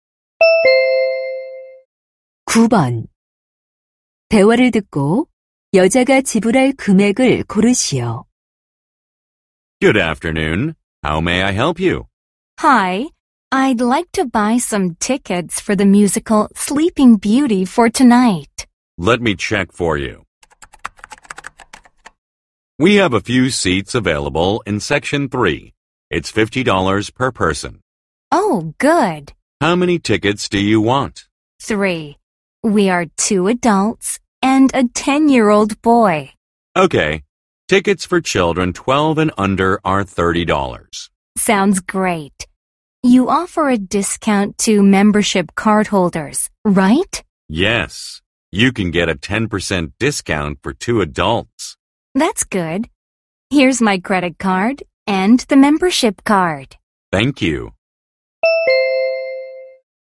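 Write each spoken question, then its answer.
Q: 대화를 듣고 여자가 지불할 금액을 고르시오.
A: 120달러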